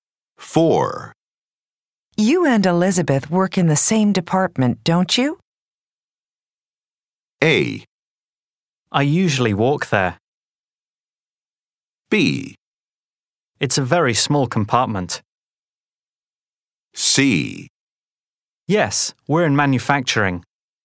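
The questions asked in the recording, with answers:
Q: You and Elizabeth work in the same department, don't you?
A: C: Yes, we're in manufacturing.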